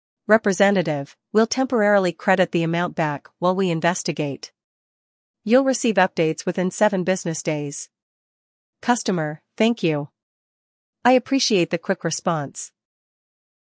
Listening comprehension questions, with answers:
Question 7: What solution does the representative offer?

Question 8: How long will it take to get updates?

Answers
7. Temporary credit of the amount
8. 7 business days

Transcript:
Representative: We'll temporarily credit the amount back while we investigate. You'll receive updates within 7 business days.
Customer: Thank you. I appreciate the quick response.